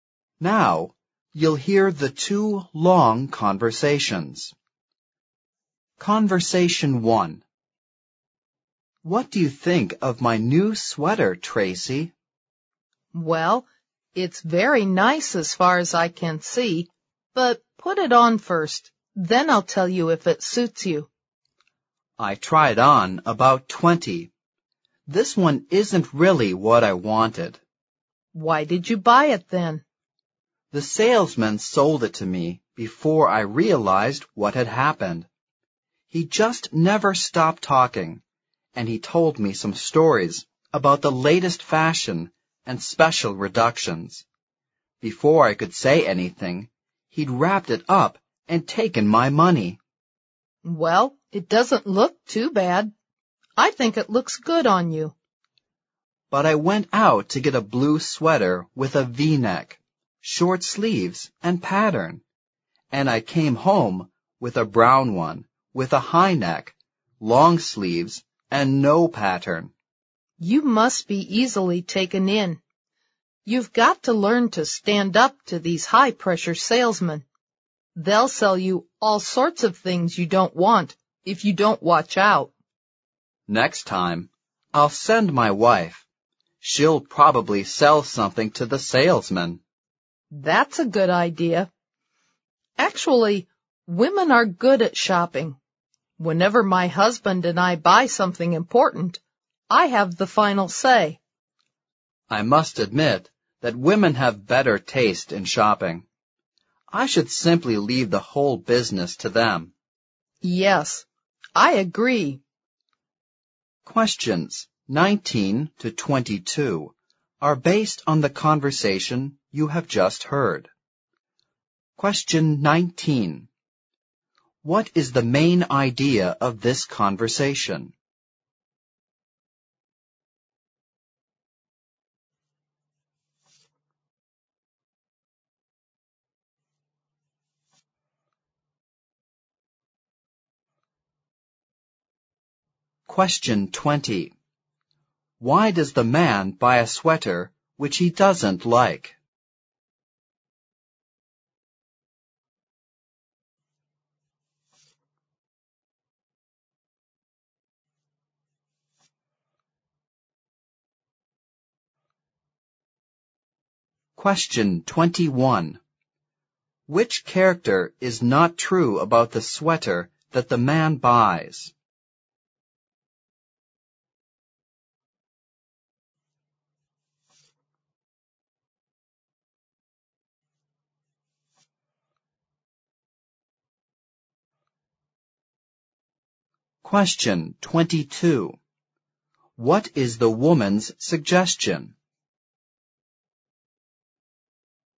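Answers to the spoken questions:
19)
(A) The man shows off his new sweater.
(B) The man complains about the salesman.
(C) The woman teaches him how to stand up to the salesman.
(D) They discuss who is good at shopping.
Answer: (B) The man complains about the salesman.
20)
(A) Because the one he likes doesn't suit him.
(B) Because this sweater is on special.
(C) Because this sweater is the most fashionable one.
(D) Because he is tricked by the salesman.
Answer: (D) Because he is tricked by the salesman.
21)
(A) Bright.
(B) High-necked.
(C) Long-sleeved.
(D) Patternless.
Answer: (A) Bright.
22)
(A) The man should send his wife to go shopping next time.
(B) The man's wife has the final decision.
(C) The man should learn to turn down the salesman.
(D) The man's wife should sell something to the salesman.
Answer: (C) The man should learn to turn down the salesman.

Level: 四级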